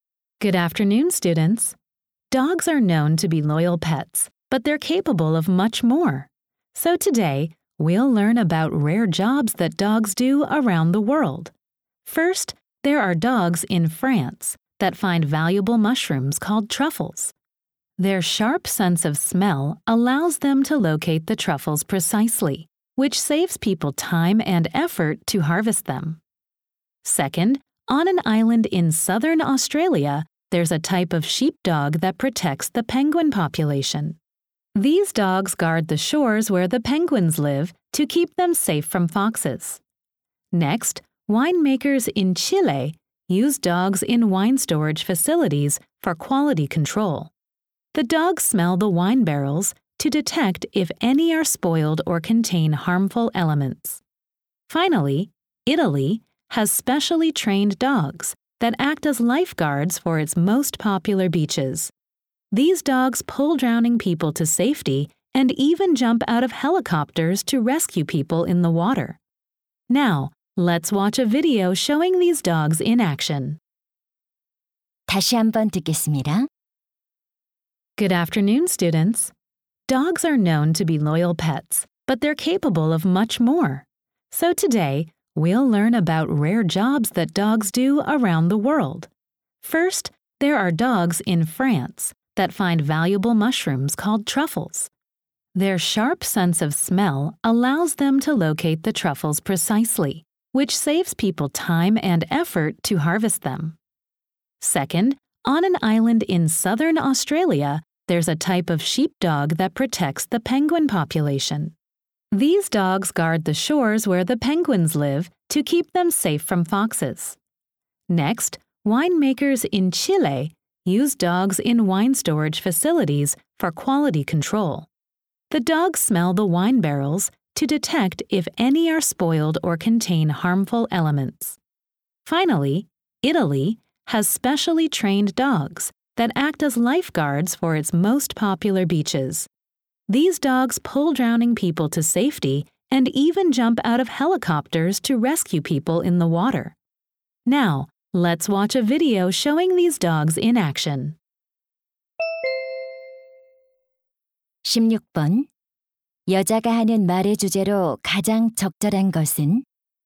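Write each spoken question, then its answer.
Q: 여자가 하는 말의 주제로 가장 적절한 것은?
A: 세계 여러 곳에서 개들이 하는 특이한 일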